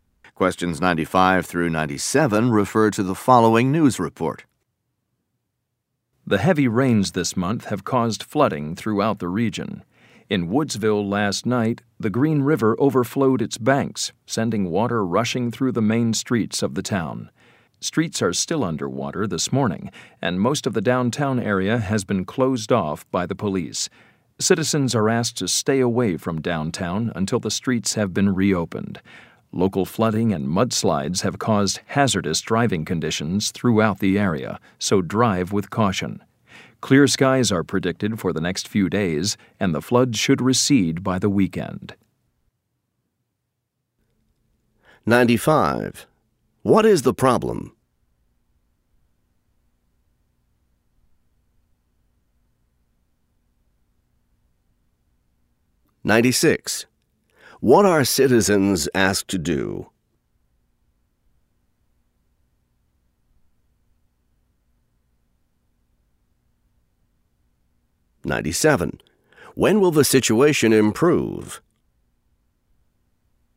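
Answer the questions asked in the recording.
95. Flooding
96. Stay away from downtown
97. By the weekend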